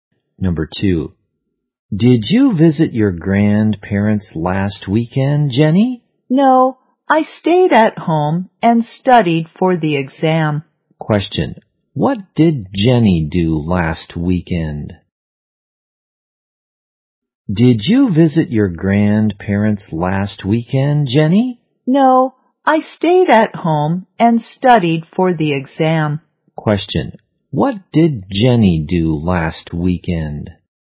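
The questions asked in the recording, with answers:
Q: what did Jenny do last weekend?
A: She stayed at home and studied for the exam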